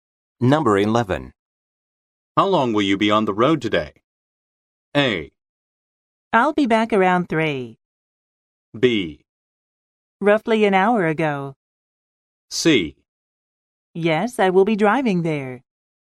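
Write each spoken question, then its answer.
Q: How long will you be on the road today?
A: A: I'll be back around 3.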